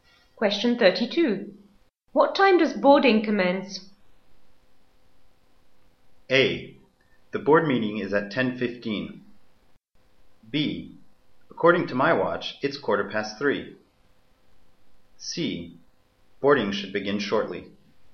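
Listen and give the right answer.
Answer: C: Boarding should begin shortly.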